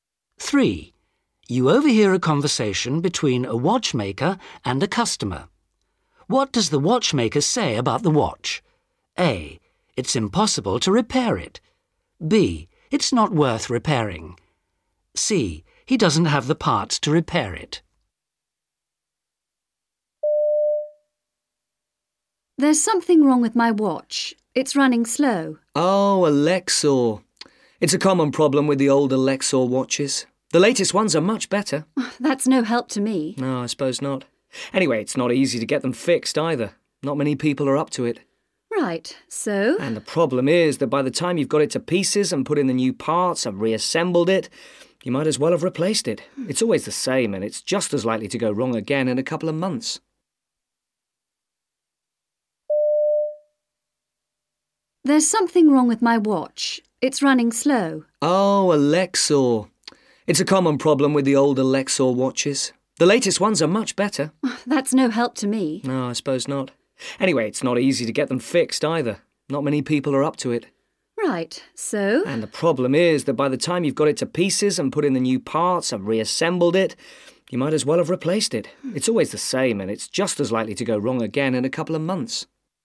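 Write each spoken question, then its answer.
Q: What does the watchmaker say about the watch?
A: B: It's not worth repairing.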